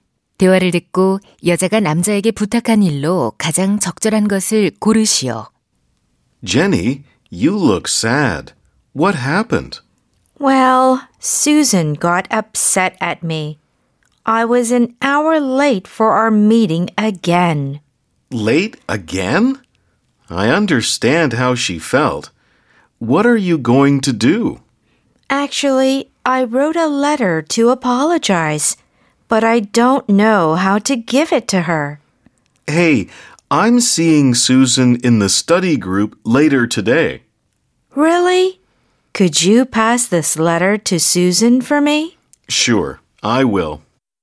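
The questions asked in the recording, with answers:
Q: 대화를 듣고 여자가 남자에게 부탁한 일로 가장 적절한 것을 고르시오.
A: Susan에게 편지 전해 주기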